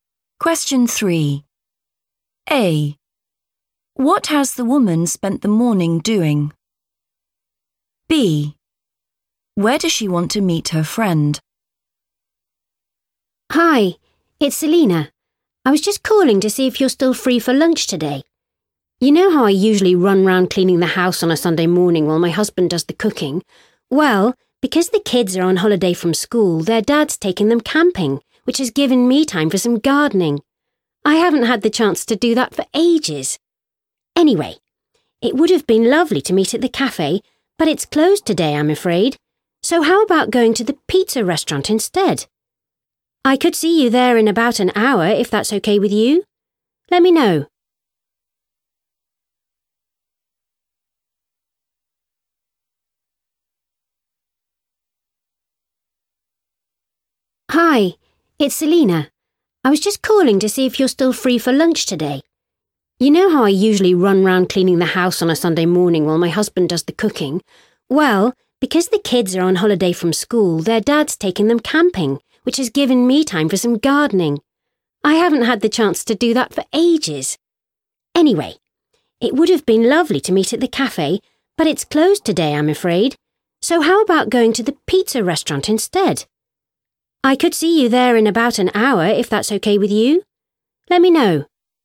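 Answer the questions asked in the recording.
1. gardening
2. the pizza restaurant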